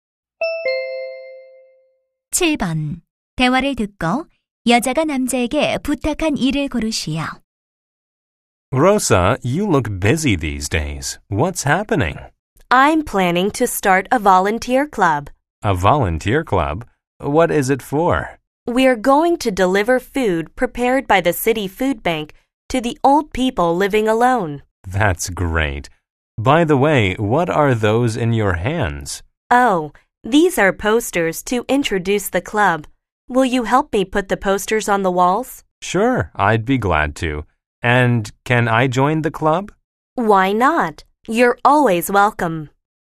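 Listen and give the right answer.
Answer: 포스터를 벽에 붙이는 것 돕기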